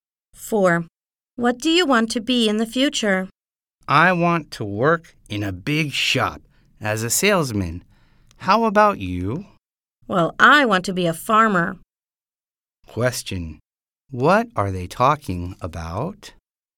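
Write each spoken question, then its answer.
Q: What are they talking about?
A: The jobs they want in the future.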